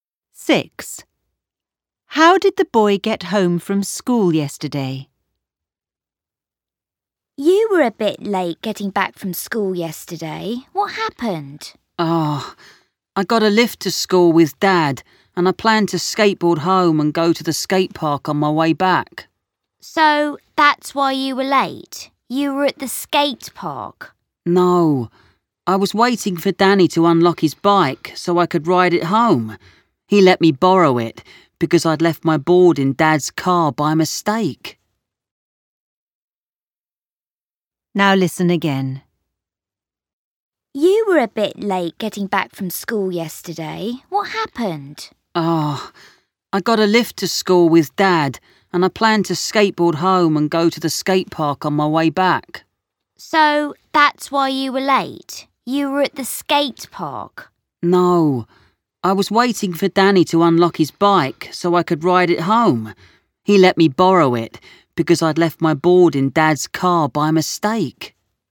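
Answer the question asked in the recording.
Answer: On Danny's bike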